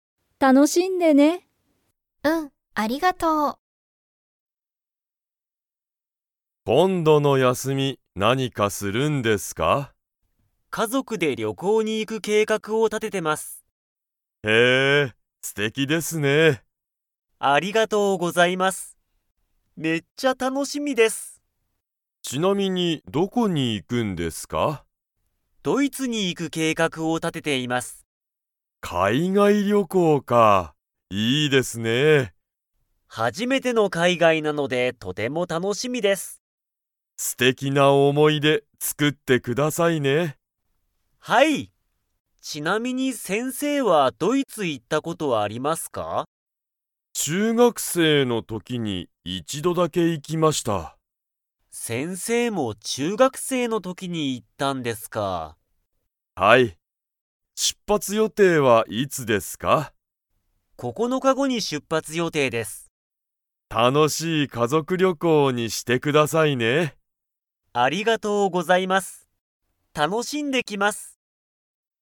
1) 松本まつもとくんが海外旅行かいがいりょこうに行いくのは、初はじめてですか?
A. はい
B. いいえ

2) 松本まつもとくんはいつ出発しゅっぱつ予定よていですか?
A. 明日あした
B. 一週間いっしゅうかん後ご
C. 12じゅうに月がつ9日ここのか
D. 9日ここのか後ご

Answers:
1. A. はい
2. D. 9日ここのか後ご

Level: Level 4

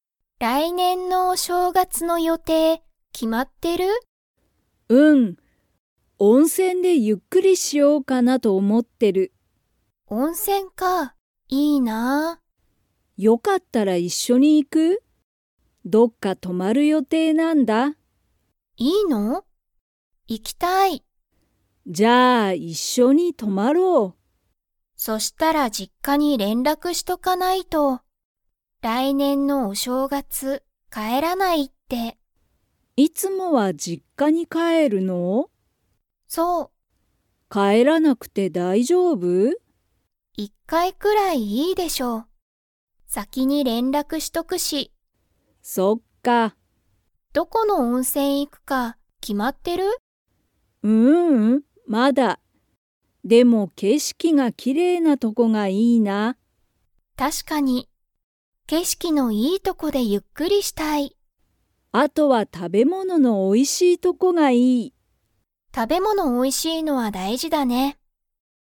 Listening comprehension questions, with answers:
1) マキは、いつもお正月しょうがつはどこに行いきますか?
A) 温泉おんせん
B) 実家じっか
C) 海外かいがい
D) 自分じぶんの家いえ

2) どこの温泉おんせん行いくか、 。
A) もう決きまってる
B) まだ決きまってない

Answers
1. B) 実家じっか
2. B) まだ決きまってない

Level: Level 4

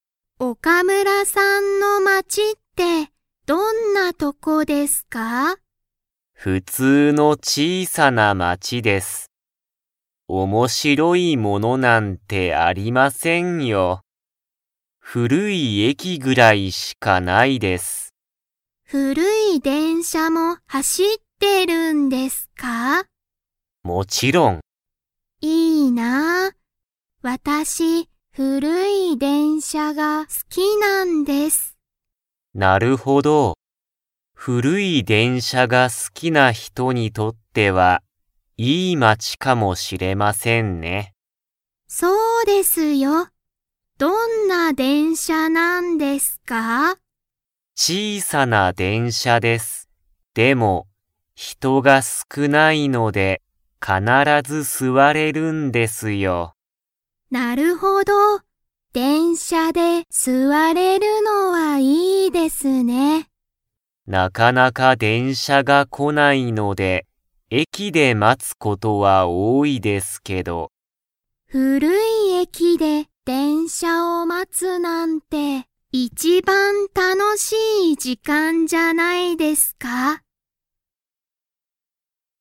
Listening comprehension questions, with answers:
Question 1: 岡村おかむらさんの町まちには、何なにがありますか?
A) 新あたらしい店みせ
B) 大おおきな電車でんしゃ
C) たくさんの人ひと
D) 古ふるい駅えき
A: D) 古ふるい駅えき

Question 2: 中島なかじまさんは、古ふるい駅えきで電車でんしゃを待まつのは と思おもっている。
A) 楽たのしい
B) つまらない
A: A) 楽たのしい

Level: Level 3

